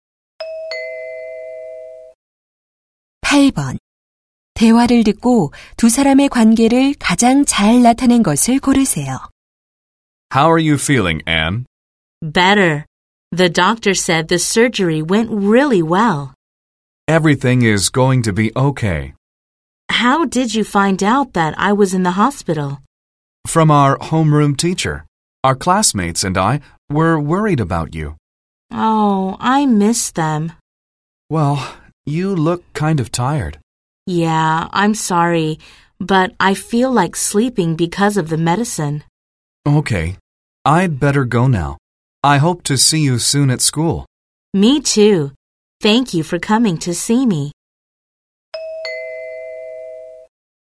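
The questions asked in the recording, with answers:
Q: 대화를 듣고 두 사람의 관계를 가장 잘 나타낸 것을 고르세요.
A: 반 친구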